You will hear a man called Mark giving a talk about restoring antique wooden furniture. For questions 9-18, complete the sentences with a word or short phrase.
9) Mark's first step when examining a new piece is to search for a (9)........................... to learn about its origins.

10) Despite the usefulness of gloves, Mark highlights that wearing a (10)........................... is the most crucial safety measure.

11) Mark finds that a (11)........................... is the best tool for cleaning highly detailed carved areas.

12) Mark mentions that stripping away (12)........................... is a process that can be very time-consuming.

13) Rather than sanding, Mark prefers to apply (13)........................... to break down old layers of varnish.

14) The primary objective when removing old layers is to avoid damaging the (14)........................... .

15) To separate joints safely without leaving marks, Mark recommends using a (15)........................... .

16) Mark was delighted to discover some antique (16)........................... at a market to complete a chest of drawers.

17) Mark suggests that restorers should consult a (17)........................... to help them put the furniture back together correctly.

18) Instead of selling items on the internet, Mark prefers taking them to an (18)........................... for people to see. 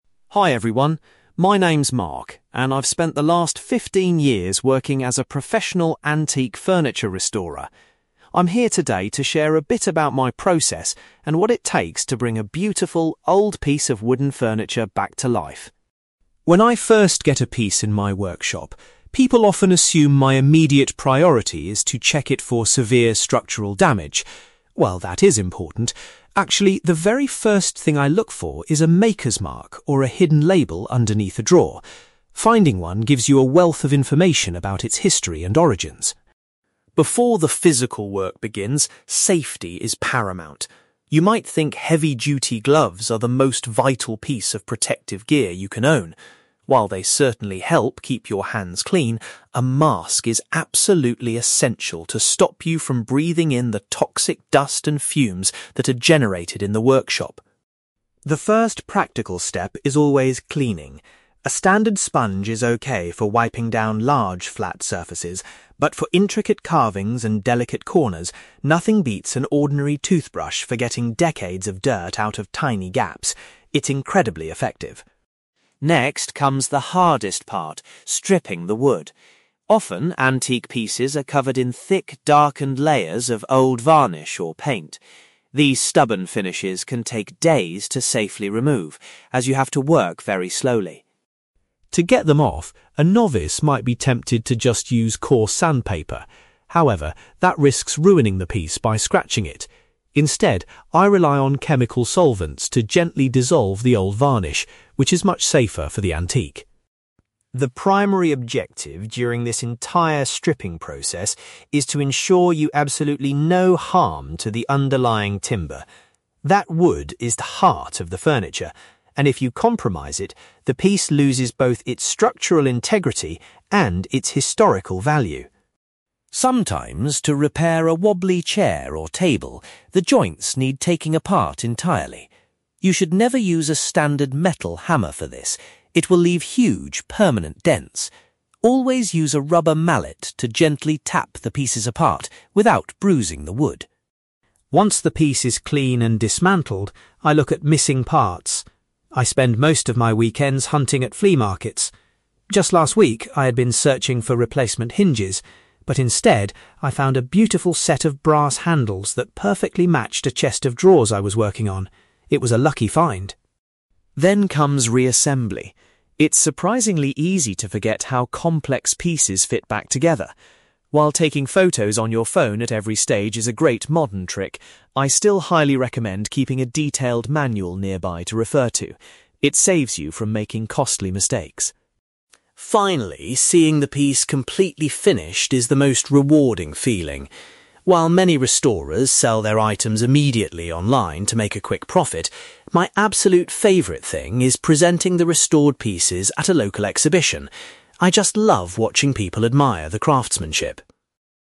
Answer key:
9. label
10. mask
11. toothbrush
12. stubborn finishes
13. chemical solvents
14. underlying timber
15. rubber mallet
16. handles
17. manual
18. exhibition

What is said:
Mark: Hi everyone. My name is Mark, and I've spent the last fifteen years working as a professional antique furniture restorer. I'm here today to share a bit about my process and what it takes to bring a beautiful, old piece of wooden furniture back to life.
When I first get a piece in my workshop, people often assume my immediate priority is to check it for severe structural damage. While that is important, actually, the very first thing I look for is a maker's mark or a hidden label underneath a drawer. Finding one gives you a wealth of information about its history and origins.
Before the physical work begins, safety is paramount. You might think heavy-duty gloves are the most vital piece of protective gear you can own. While they certainly help keep your hands clean, a mask is absolutely essential to stop you from breathing in the toxic dust and fumes that are generated in the workshop.
The first practical step is always cleaning. A standard sponge is okay for wiping down large, flat surfaces, but for intricate carvings and delicate corners, nothing beats an ordinary toothbrush for getting decades of dirt out of tiny gaps. It's incredibly effective.
Next comes the hardest part: stripping the wood. Often, antique pieces are covered in thick, darkened layers of old varnish or paint. These stubborn finishes can take days to safely remove, as you have to work very slowly.
To get them off, a novice might be tempted to just use coarse sandpaper. However, that risks ruining the piece by scratching it. Instead, I rely on chemical solvents to gently dissolve the old varnish, which is much safer for the antique.
The primary objective during this entire stripping process is to ensure you do absolutely no harm to the underlying timber. That wood is the heart of the furniture, and if you compromise it, the piece loses both its structural integrity and its historical value.
Sometimes, to repair a wobbly chair or table, the joints need taking apart entirely. You should never use a standard metal hammer for this; it will leave huge, permanent dents. Always use a rubber mallet to gently tap the pieces apart without bruising the wood.
Once the piece is clean and dismantled, I look at missing parts. I spend most of my weekends hunting at flea markets. Just last week, I had been searching for replacement hinges, but instead, I found a beautiful set of brass handles that perfectly matched a chest of drawers I was working on. It was a lucky find!
Then comes reassembly. It's surprisingly easy to forget how complex pieces fit back together. While taking photos on your phone at every stage is a great modern trick, I still highly recommend keeping a detailed manual nearby to refer to. It saves you from making costly mistakes.
Finally, seeing the piece completely finished is the most rewarding feeling. While many restorers sell their items immediately online to make a quick profit, my absolute favorite thing is presenting the restored pieces at a local exhibition. I just love watching people admire the craftsmanship.

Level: B2